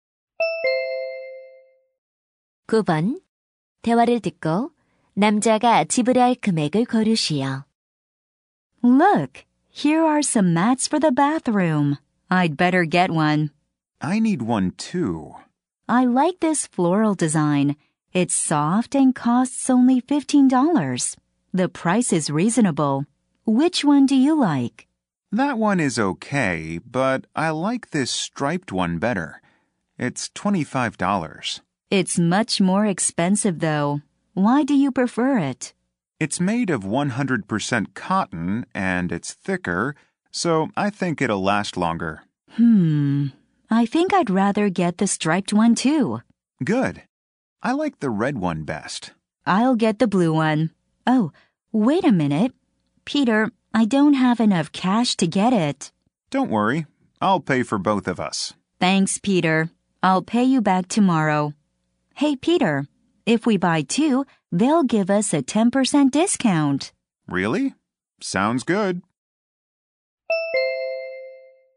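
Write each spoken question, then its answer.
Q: 대화를 듣고 남자가 지불할 금액을 고르시오.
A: $45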